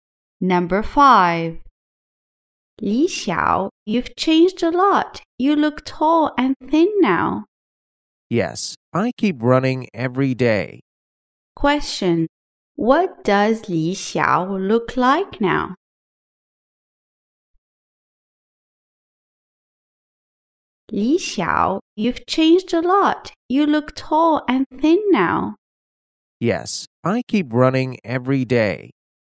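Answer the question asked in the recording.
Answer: Tall and thin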